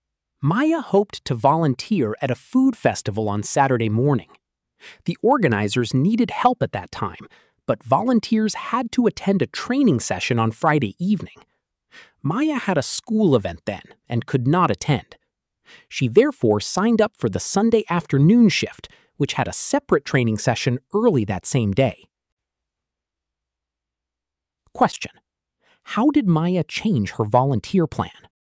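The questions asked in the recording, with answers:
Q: how did Maya change her volunteer plan?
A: She signed up for the Sunday afternoon shift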